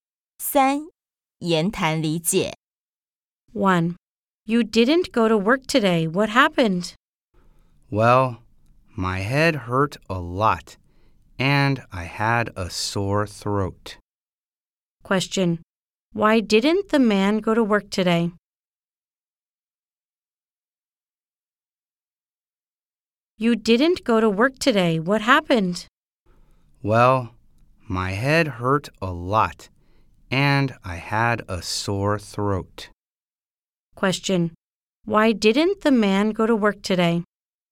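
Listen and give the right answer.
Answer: His head hurt a lot and he had a sore throat.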